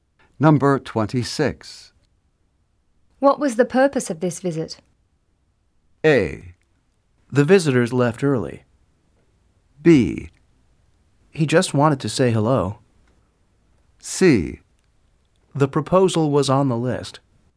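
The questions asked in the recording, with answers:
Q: What was the purpose of this visit?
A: B: He just wanted to say hello.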